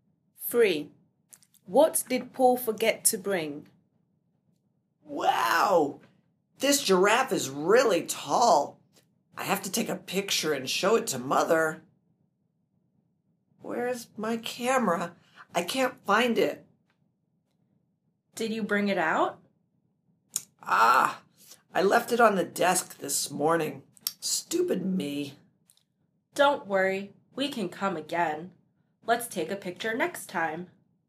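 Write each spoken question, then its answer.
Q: What did Paul forget to bring?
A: His camera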